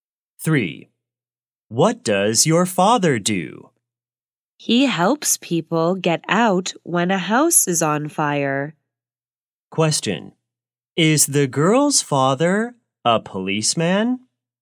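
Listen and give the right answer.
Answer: No, he is a firefighter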